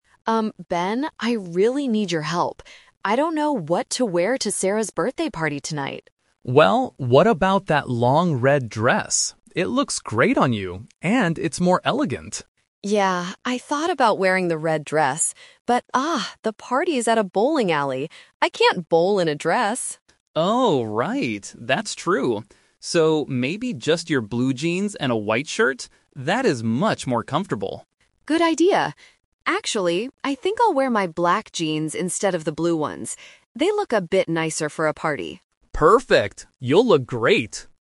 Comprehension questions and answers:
Listen to the conversation between two friends and choose the correct answer (A, B, or C) for each question.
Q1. Why does Anna decide NOT to wear the long red dress?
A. It is too small for her.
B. She is going to a bowling alley.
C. She doesn't like the color.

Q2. What will Anna wear to the party?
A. A long red dress.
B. Blue jeans and a white shirt.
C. Black jeans and a white shirt.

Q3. What does Ben think about the long red dress?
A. It is more elegant.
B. It is much more comfortable.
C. It is a bit too expensive.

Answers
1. B. She is going to a bowling alley.
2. C. Black jeans and a white shirt.
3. A. It is more elegant.

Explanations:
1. Anna says she cannot bowl in a dress. Option (A) and (C) are plausible reasons in a clothing context, but they are not mentioned in the audio.
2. This is the "Twist." Option (A) is the first trap; the red dress was mentioned but rejected because of the activity. Option (B) is the second trap; Ben suggested the blue jeans, but Anna changed the plan at the very end to black jeans because they "look a bit nicer."
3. Ben explicitly says the red dress is "more elegant." Option (B) is a trap; Ben uses the words "much more comfortable" to describe the jeans, not the dress. Option (C) is not mentioned.

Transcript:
Anna: Um, Ben, I really need your help. I don't know what to wear to Sarah's birthday party tonight.
Ben: Well, what about that long red dress? It looks great on you, and it's more elegant.
Anna: Yeah, I thought about wearing the red dress. But, ah, the party is at a bowling alley. I can't bowl in a dress!
Ben: Oh, right. That's true. So, maybe just your blue jeans and a white shirt? That is much more comfortable.
Anna: Good idea. Actually, I think I'll wear my black jeans instead of the blue ones. They look a bit nicer for a party.

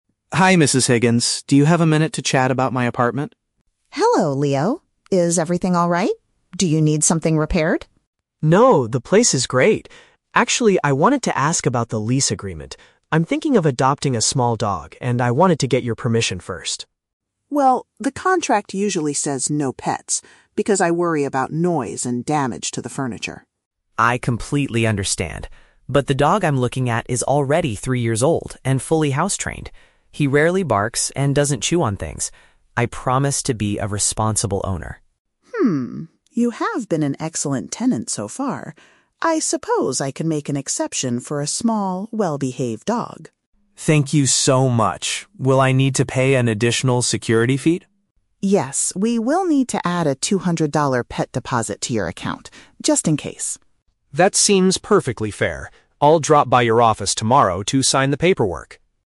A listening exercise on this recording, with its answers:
Listen to a telephone conversation between a tenant and a landlord. Choose the correct answer (A, B, or C) for each question.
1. Why is Leo calling his landlord?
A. To request a repair for some damaged furniture.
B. To complain about a noisy dog in the neighborhood.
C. To ask if he is allowed to keep an animal in his home.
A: C. To ask if he is allowed to keep an animal in his home.

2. How does Leo describe the dog he wants to adopt?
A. It is a young puppy that needs to be taught how to behave.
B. It is an adult dog that already knows how to act indoors.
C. It is a guard dog that barks loudly to protect the house.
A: B. It is an adult dog that already knows how to act indoors.

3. What condition must Leo meet to keep the pet?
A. He must pay an extra sum of money as a guarantee.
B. He must sign a completely new rental contract for three years.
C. He must agree to keep the dog outside in the garden.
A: A. He must pay an extra sum of money as a guarantee.

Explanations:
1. Leo says he wants to "get your permission" (ask if he is allowed) to adopt a "small dog" (keep an animal). Option A is the Trap: Mrs. Higgins asks if he needs something "repaired" and mentions "damage to the furniture", but Leo says "No, the place is great". Option B is also a Trap: "Noise" and "barks" are mentioned, but he is not complaining about a neighbor's dog.
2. Leo describes the dog as "three years old" (adult) and "fully house-trained" (knows how to act indoors). Option A is the opposite of the truth; it is not a young puppy. Option C is the Trap: The word "barks" is in the audio, but Leo explicitly says the dog "rarely barks".
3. Mrs. Higgins states that they will add a "two-hundred-dollar pet deposit" to his account. Option A paraphrases this (extra sum of money as a guarantee = pet deposit / additional security fee). Option B is the Trap: Leo mentions the "lease agreement" (rental contract) and the dog is "three years" old, but he doesn't have to sign a 3-year contract. Option C is not mentioned.

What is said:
Leo: Hi Mrs. Higgins. Do you have a minute to chat about my apartment?
Mrs. Higgins: Hello, Leo. Is everything alright? Do you need something repaired?
Leo: No, the place is great. Actually, I wanted to ask about the lease agreement. I'm thinking of adopting a small dog, and I wanted to get your permission first.
Mrs. Higgins: Well, the contract usually says "no pets" because I worry about noise and damage to the furniture.
Leo: I completely understand. But the dog I'm looking at is already three years old and fully house-trained. He rarely barks and doesn't chew on things. I promise to be a responsible owner.
Mrs. Higgins: Hmm, you have been an excellent tenant so far. I suppose I can make an exception for a small, well-behaved dog.
Leo: Thank you so much! Will I need to pay an additional security fee?
Mrs. Higgins: Yes, we will need to add a two-hundred-dollar pet deposit to your account, just in case.

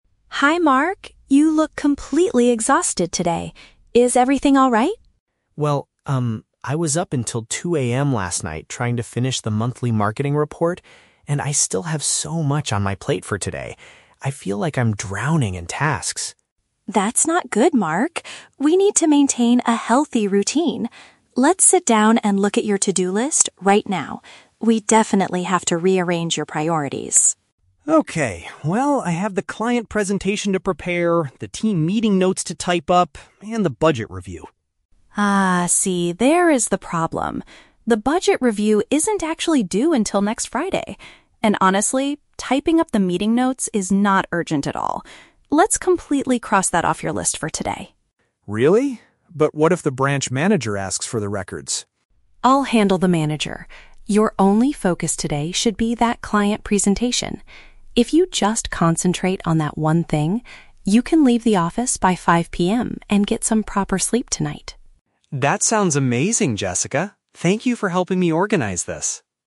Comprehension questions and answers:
Listen to the conversation between a team leader (Jessica) and an employee (Mark), and choose the correct answer (A, B, or C).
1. Why is Mark feeling extremely tired today?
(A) He stayed awake very late doing office work.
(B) He had to prepare a long client presentation.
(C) He went out with his friends until midnight.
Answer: (A) He stayed awake very late doing office work.

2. What does Jessica decide to do with Mark's task list?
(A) She asks him to finish the budget review immediately.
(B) She removes the task of writing the meeting records.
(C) She promises to type the meeting notes for him.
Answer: (B) She removes the task of writing the meeting records.

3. What is the main goal of Jessica's solution?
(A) To prepare for the manager's meeting next Friday.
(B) To hire more staff to share the heavy workload.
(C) To ensure Mark can go home on time and rest.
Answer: (C) To ensure Mark can go home on time and rest.

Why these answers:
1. Mark says he was "up until 2:00 AM last night trying to finish the monthly marketing report." "Stayed awake very late" is a paraphrase of being up until 2:00 AM.
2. Jessica tells Mark that typing the meeting notes is not urgent and says, "Let's completely cross that off your list for today." To "cross off" means to remove.
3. Jessica says that if he only focuses on one task, he can "leave the office by 5 PM and get some proper sleep tonight."

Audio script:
Jessica: Hi Mark. You look completely exhausted today. Is everything alright?
Mark: Well, um, I was up until 2:00 AM last night trying to finish the monthly marketing report, and I still have so much on my plate for today. I feel like I'm drowning in tasks.
Jessica: That's not good, Mark. We need to maintain a healthy routine. Let's sit down and look at your to-do list right now. We definitely have to rearrange your priorities.
Mark: Okay. Well, I have the client presentation to prepare, the team meeting notes to type up, and the budget review.
Jessica: Ah, see, there is the problem. The budget review isn't actually due until next Friday. And honestly, typing up the meeting notes is not urgent at all. Let's completely cross that off your list for today.
Mark: Really? But what if the branch manager asks for the records?
Jessica: I'll handle the manager. Your only focus today should be that client presentation. If you just concentrate on that one thing, you can leave the office by 5 PM and get some proper sleep tonight.

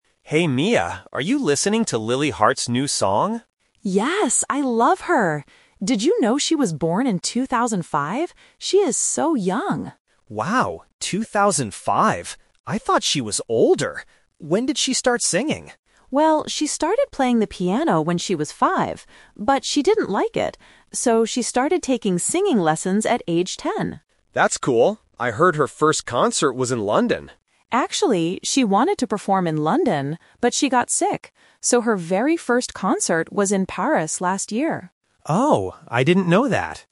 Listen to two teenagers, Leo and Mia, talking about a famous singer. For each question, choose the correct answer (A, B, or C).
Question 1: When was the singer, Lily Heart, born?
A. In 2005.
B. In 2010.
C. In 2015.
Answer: A. In 2005.

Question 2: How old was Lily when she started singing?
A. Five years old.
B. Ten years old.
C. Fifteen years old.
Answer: B. Ten years old.

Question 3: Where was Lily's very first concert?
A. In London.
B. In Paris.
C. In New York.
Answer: B. In Paris.

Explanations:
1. Mia clearly states the fact: "Did you know she was born in 2005?" Why the traps are wrong: Options B and C are plausible birth years for a young person, but they are not mentioned in the audio.
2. This is a "Twist Trap". Mia says she started taking singing lessons "at age ten". Why the traps are wrong: Option A is a trap because she was five when she started playing the piano, not singing. Option C is not mentioned.
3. Another "Twist Trap". Mia explains that because Lily got sick, "her very first concert was in Paris last year." Why the traps are wrong: Option A is the trap. Leo heard it was in London, and Mia confirms she wanted to perform there, but it didn't happen because she got sick. Option C is not mentioned.

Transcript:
Leo: Hey Mia, are you listening to Lily Heart's new song?
Mia: Yes! I love her. Did you know she was born in 2005? She is so young.
Leo: Wow, 2005? I thought she was older. When did she start singing?
Mia: Well, she started playing the piano when she was five. But she didn't like it. So, she started taking singing lessons at age ten.
Leo: That's cool. I heard her first concert was in London.
Mia: Actually, she wanted to perform in London, but she got sick. So her very first concert was in Paris last year.

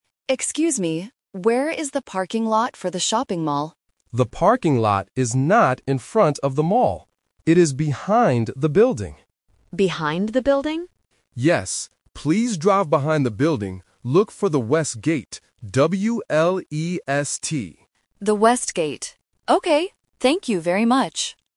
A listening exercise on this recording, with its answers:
Listen to the conversation between a driver and a security guard. Read the questions and choose the correct answer (A, B, or C).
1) What is the driver looking for?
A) The shopping mall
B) The parking lot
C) The bus stop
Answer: B) The parking lot

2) Where is the parking lot?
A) In front of the mall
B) Inside the mall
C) Behind the building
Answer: C) Behind the building

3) What is the name of the gate?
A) West gate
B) Rest gate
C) Best gate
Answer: A) West gate

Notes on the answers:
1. The driver asks at the very beginning, "Where is the parking lot...?" Why the traps are wrong: Option A is a trap because "shopping mall" is mentioned, but the driver is specifically looking for its parking lot, not the mall itself. Option C is a plausible place but is never mentioned.
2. The security guard explicitly says, "It is behind the building," and the driver repeats it to confirm. Why the traps are wrong: Option A is a trap because the guard says the parking lot is not in front of the mall. Option B is a plausible location for parking, but it is not mentioned in the audio.
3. The security guard names the gate and spells it out clearly: "Look for the West gate. W-E-S-T." Why the traps are wrong: Options B (Rest) and C (Best) are phonetic traps that rhyme with "West", testing if the student can hear and follow the exact spelling provided.

